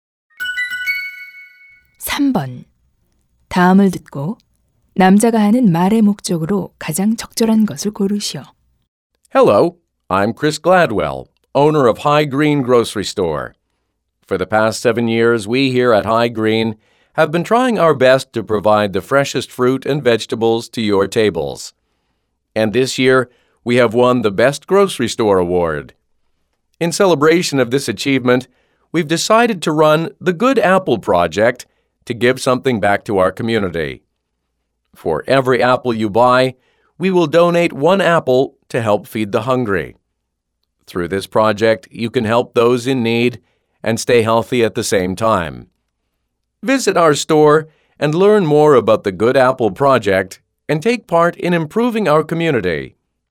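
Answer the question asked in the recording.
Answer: 사과 한 개를 살 때마다 한 개를 기부하는 Good Apple Project 참여를 독려하려고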